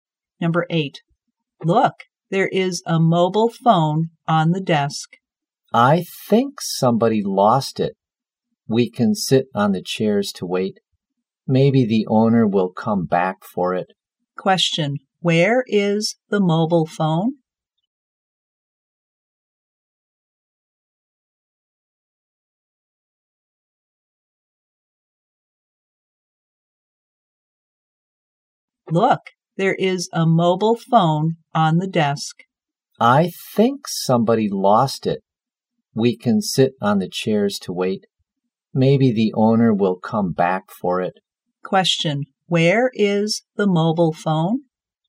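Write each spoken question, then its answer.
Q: where is the mobile phone?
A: On the desk.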